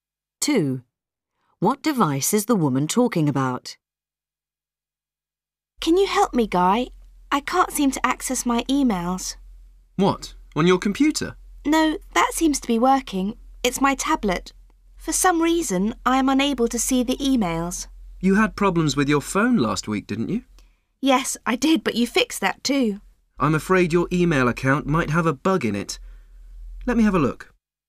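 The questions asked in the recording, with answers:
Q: What device is the woman talking about?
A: Her tablet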